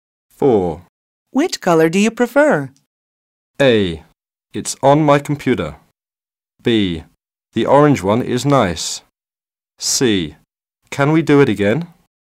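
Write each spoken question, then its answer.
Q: Which color do you prefer?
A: B: The orange one is nice.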